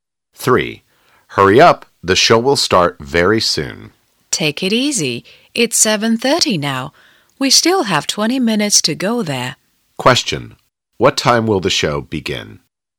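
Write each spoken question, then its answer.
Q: What time will the show begin?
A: 7:50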